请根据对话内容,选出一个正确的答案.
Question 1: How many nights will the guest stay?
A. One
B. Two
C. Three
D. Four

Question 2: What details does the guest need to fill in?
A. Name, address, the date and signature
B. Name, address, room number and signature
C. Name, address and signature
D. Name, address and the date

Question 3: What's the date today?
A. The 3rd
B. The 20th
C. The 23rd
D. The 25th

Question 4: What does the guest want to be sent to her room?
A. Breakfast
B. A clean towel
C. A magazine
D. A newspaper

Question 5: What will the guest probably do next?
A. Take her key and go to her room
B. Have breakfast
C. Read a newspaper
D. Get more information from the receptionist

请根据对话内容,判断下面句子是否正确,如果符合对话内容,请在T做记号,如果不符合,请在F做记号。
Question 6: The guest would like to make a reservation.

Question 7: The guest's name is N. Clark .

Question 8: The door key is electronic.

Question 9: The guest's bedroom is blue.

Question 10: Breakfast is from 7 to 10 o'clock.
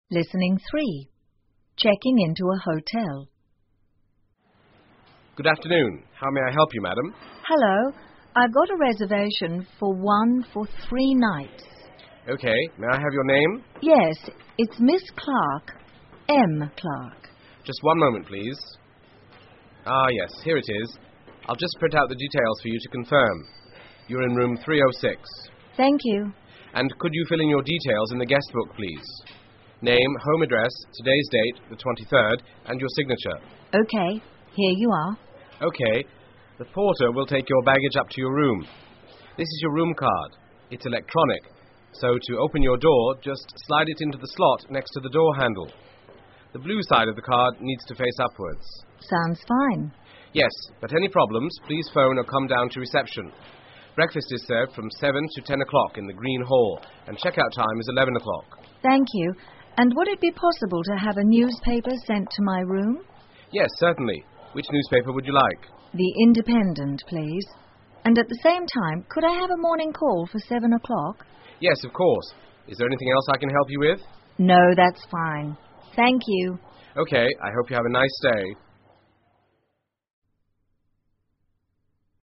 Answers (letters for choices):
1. C
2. A
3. C
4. D
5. A
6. F
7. F
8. T
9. F
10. T

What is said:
Listening 3 Checking into a Hotel 登记入住
Front Desk: Good afternoon. How may I help you, Madam?
Guest:Hello.I've got a reservation for one for three nights.
FD:OK.May I have your name?
G:Yes.It's Miss Clark.M.Clark.
FD:Just one moment,please.Ah,yes.Here it is.I'll just print out the details for you to confirm. You're in room 306.
G:Thank you.
FD:And could you fill in your details in the guest book,please.Name,home address,today's date,the 23rd and your signature.
G:OK...Here you are.
FD:OK.The porter will take your baggage up to your room.This is your room card.It's electronic.So to open your door,just slide it into the slot next to the door handle.The blue side of the card needs to face upwards.
G:Sounds fine.
FD:Yes.But any problems,please phone or come down to reception.Breakfast is served from 7 to 10 o'clock in the Green Hall and checkout time is 11 o'clock.
G:Thank you.And would it be possible to have a newspaper sent to my room?
FD:Yes,certainly.Which newspaper would you like?
G:The Independent,please.And at the same time,could I have a morning call for 7 o'clock?
FD:Yes,of course.Is there anything else I can help you with?
G:No,that's fine.Thank you.
FD:OK.I hope you have a nice stay.